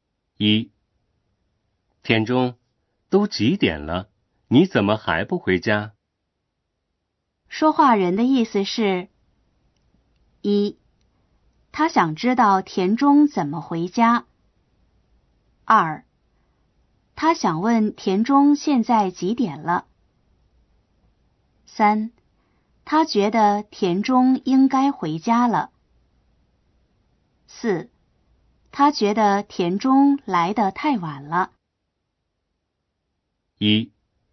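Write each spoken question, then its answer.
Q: 说话人的意思是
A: 3: 他觉得田中应该回家了。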